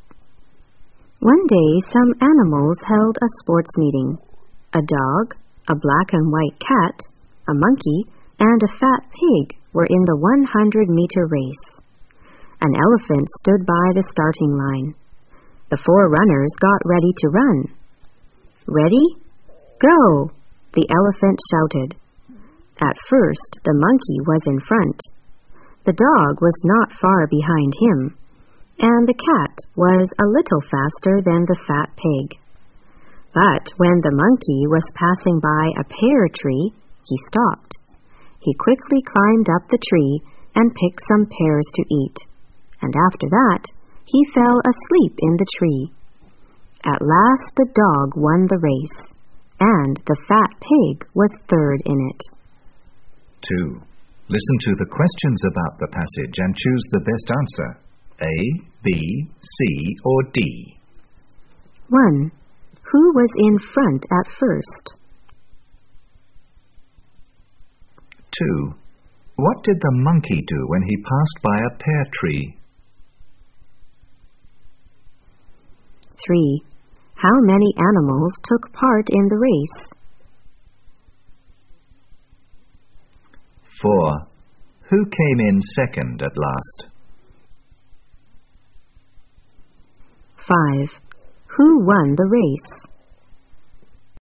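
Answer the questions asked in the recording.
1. The monkey
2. He climbed up the tree, picked pears to eat and fell asleep
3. Four
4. The black and white cat
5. The dog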